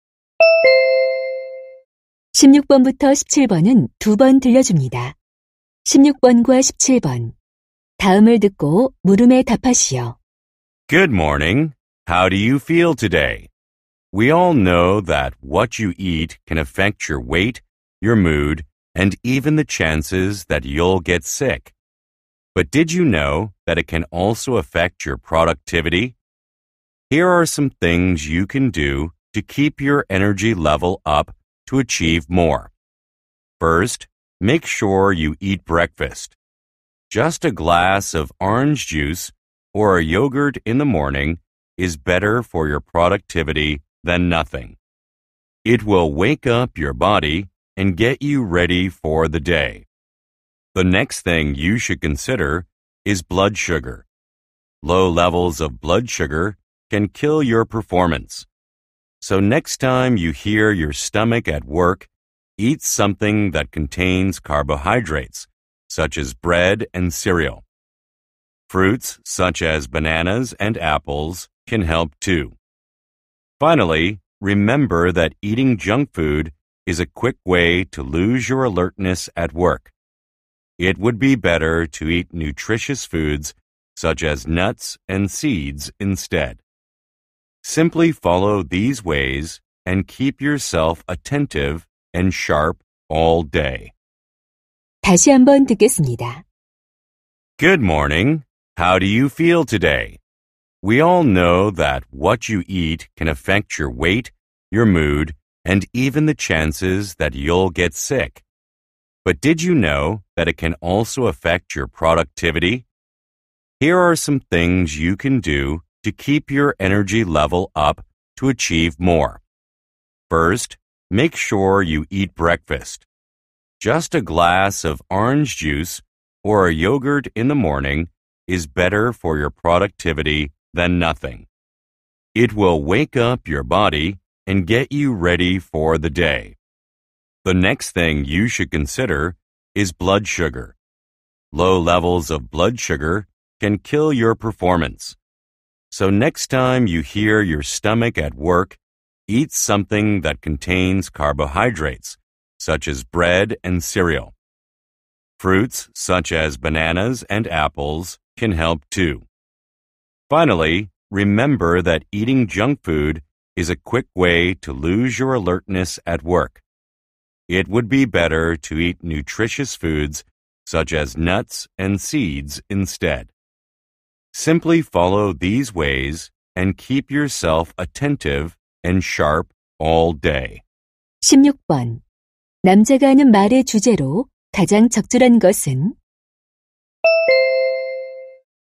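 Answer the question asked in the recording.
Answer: 업무 생산성을 높이는 식습관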